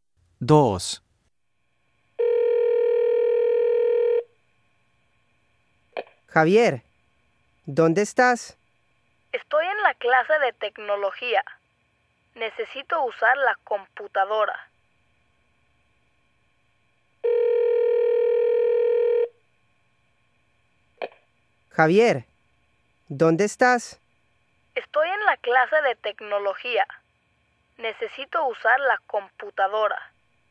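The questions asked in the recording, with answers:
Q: Javier, ¿dónde estás?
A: En la clase de tecnología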